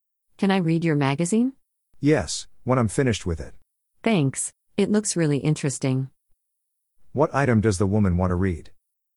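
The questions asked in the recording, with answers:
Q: What item does the woman want to read?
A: A magazine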